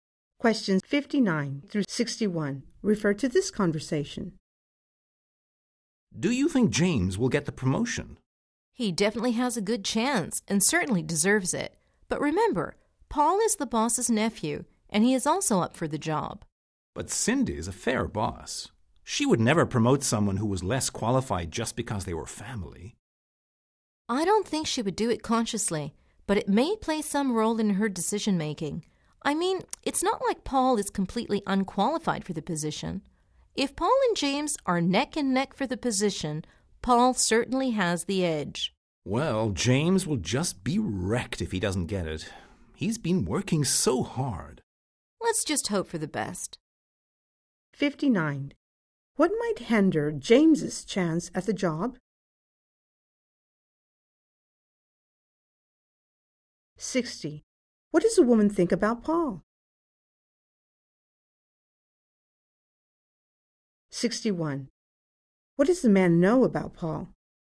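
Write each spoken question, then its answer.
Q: What might hinder James's chance at the job?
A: Paul, the boss's nephew, is also up for the job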